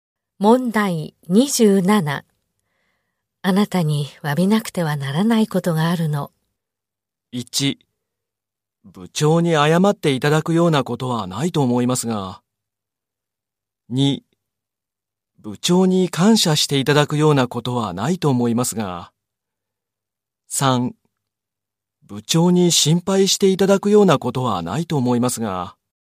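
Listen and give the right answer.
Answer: 1: 部長に謝っていただくようなことはないと思いますが。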